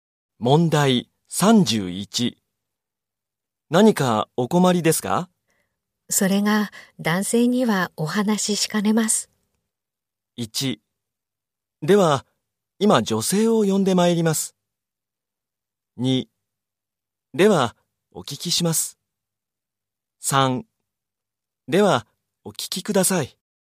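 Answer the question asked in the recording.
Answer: 1: では、今女性を呼んでまいります。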